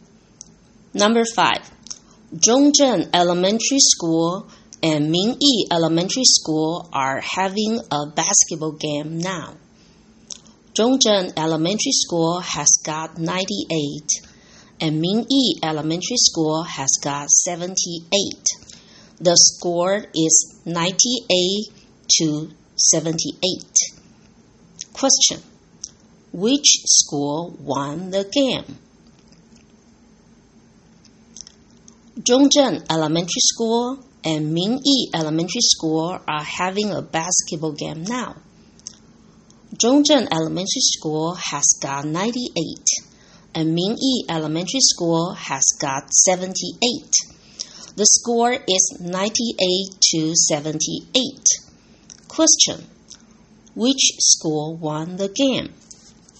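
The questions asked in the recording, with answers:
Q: Which school won the game?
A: Zhongzhen Elementary School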